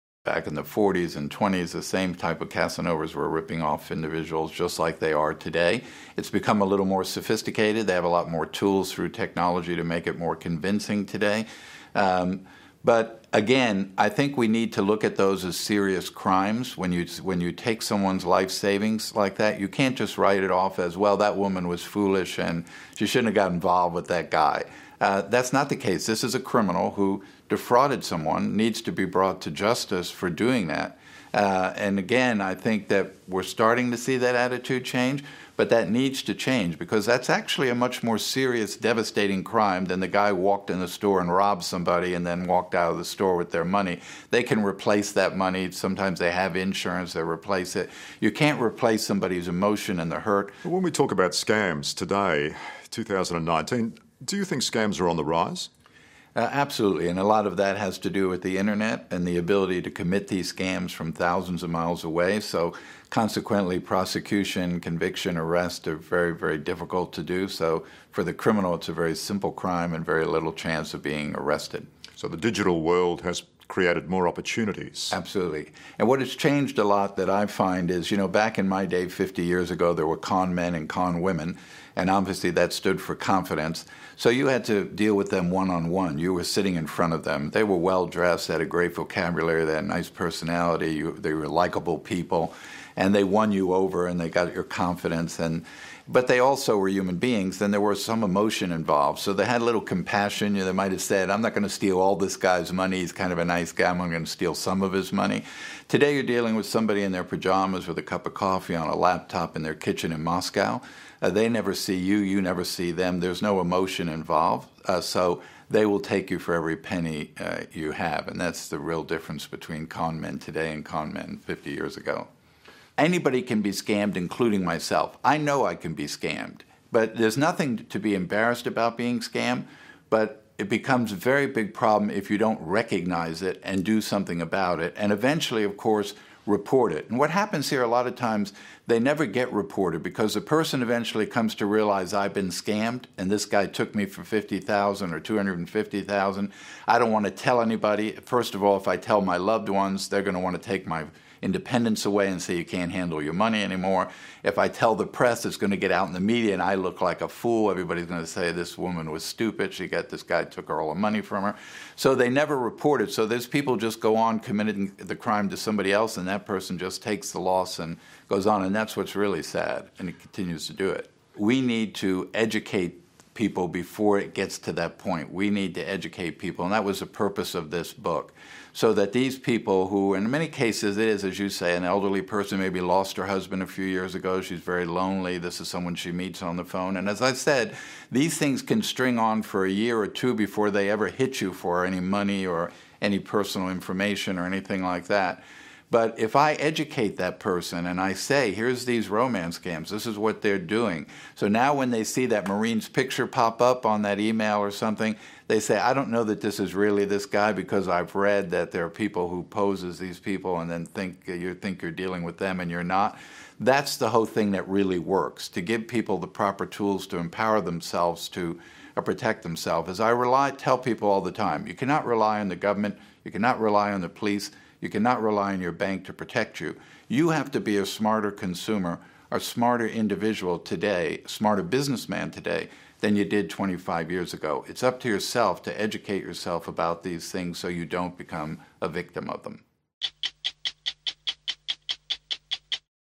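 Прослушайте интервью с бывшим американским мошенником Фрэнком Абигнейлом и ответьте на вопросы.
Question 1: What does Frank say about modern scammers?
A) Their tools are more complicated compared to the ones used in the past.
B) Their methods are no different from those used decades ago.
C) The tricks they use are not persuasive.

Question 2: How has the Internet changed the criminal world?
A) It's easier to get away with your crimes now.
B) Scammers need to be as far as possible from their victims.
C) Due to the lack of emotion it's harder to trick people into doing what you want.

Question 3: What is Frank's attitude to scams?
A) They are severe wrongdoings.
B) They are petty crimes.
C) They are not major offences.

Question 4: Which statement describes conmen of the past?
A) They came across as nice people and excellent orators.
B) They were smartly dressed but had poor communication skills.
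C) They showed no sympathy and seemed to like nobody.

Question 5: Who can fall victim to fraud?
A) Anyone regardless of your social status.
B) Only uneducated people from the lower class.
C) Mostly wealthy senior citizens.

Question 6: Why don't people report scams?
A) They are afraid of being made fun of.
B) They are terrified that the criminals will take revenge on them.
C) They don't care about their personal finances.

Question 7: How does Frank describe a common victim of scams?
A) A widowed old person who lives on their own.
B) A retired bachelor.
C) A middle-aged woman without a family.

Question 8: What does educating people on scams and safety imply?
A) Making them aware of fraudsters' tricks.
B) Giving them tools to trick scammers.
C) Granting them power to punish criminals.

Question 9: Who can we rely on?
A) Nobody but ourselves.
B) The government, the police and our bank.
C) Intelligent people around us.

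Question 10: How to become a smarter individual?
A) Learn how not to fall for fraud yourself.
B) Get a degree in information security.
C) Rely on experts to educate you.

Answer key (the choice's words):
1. Their tools are more complicated compared to the ones used in the past.
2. It's easier to get away with your crimes now.
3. They are severe wrongdoings.
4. They came across as nice people and excellent orators.
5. Anyone regardless of your social status.
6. They are afraid of being made fun of.
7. A widowed old person who lives on their own.
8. Making them aware of fraudsters' tricks.
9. Nobody but ourselves.
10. Learn how not to fall for fraud yourself.

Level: Upper-intermediate (продвинутый уровень)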